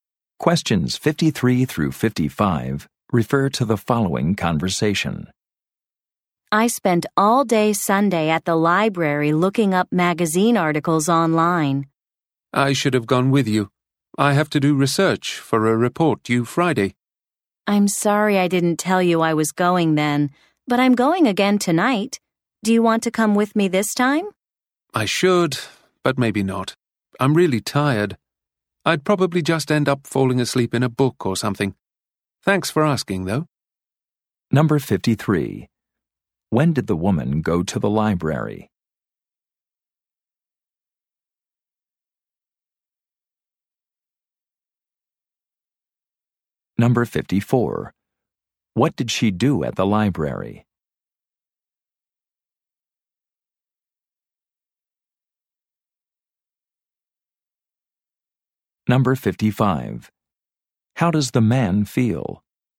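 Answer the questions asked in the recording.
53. On Sunday
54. Looked up magazine articles online
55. Tired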